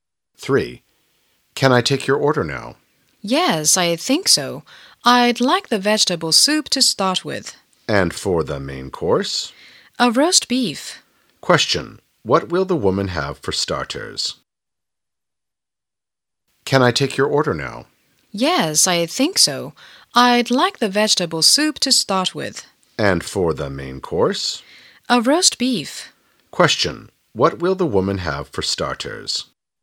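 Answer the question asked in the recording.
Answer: Vegetable soup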